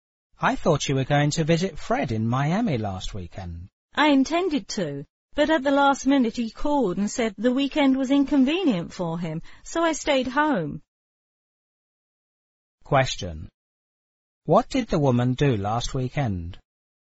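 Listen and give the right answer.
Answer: She stayed home.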